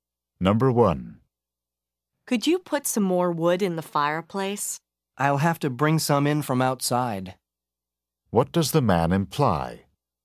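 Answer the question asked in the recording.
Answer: There is no more wood inside; he must get some from outside.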